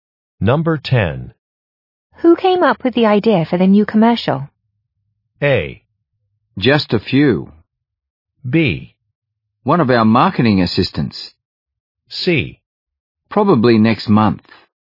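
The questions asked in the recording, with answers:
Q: Who came up with the idea for the new commercial?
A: B: One of our marketing assistants.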